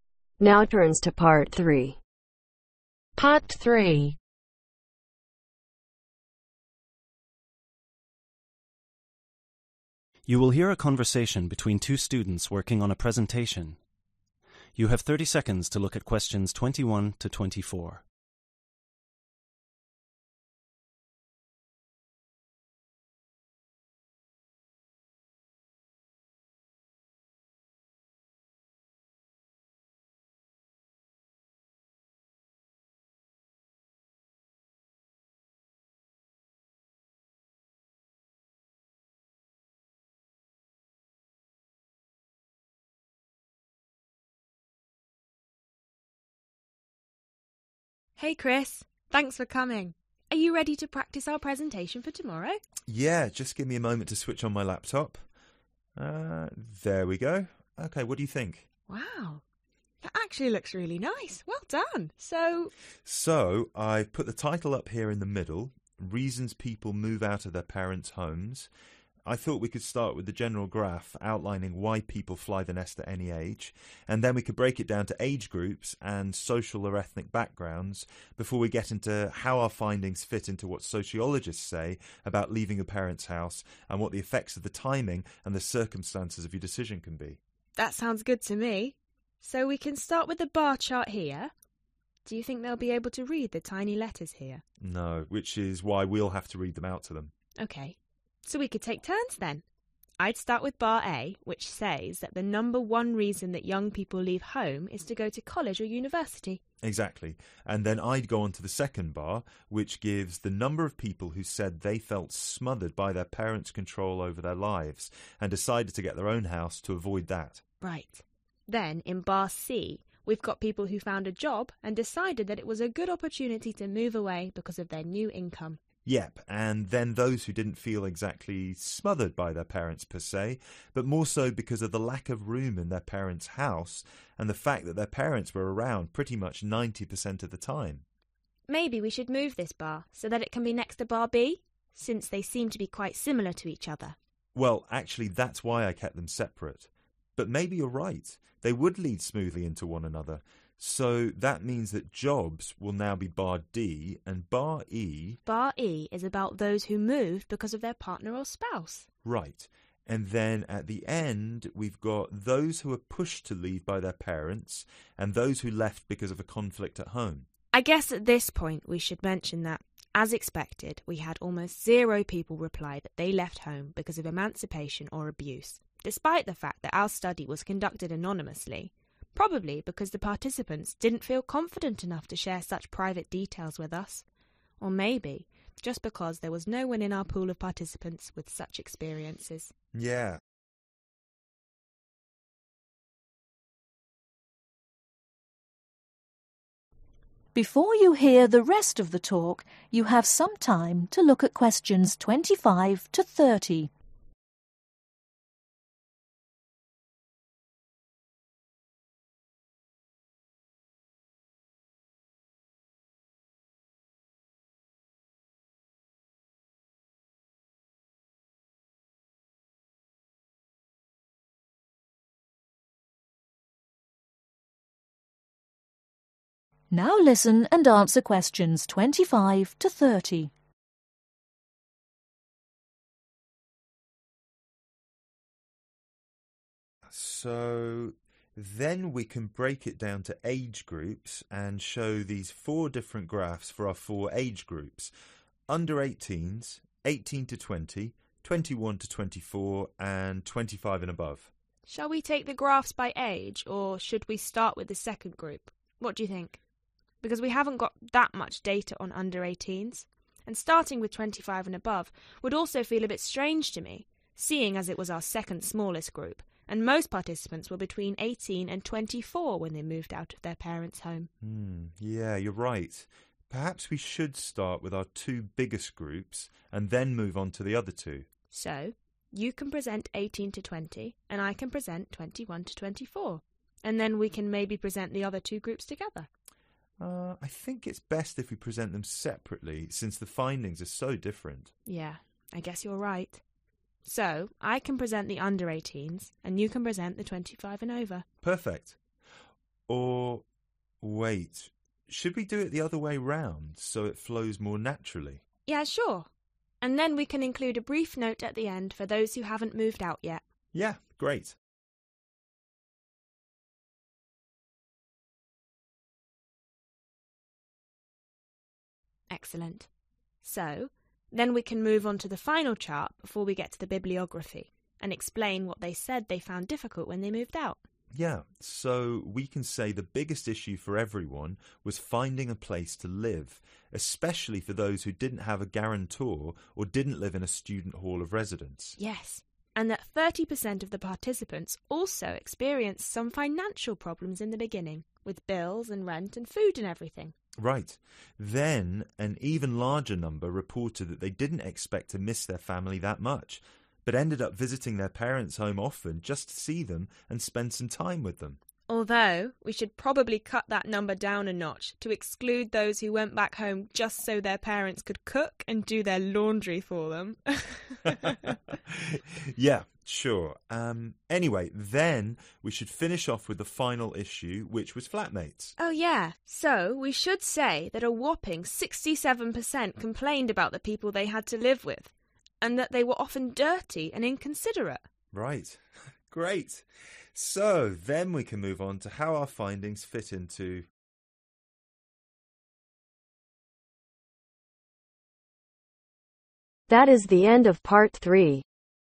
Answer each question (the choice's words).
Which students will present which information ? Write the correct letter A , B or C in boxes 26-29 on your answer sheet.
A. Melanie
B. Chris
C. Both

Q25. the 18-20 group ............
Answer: Chris

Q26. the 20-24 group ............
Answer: Melanie

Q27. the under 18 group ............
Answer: Chris

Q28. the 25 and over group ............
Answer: Melanie

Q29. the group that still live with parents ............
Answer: Both